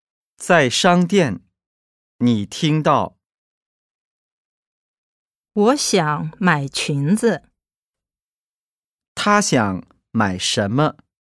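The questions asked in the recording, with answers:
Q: 他想买什么?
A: 裙子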